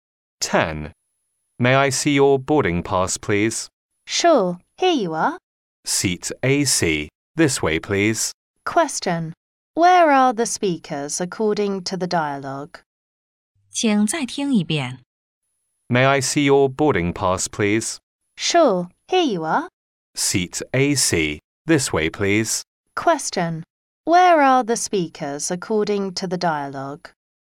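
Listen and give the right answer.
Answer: On a plane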